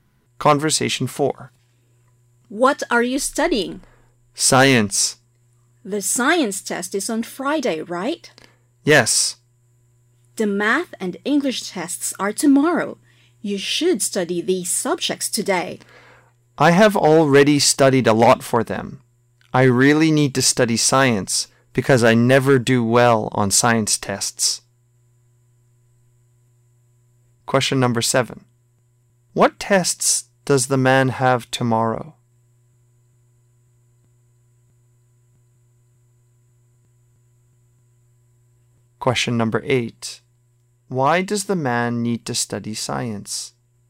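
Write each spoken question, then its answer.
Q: What tests does the man have tomorrow?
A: Math and English tests

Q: Why does the man need to study science?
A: Because he never does well on science tests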